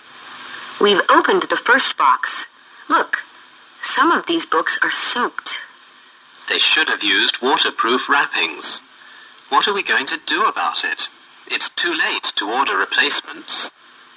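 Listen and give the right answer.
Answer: Some of the books got soaked because they weren't wrapped waterproof.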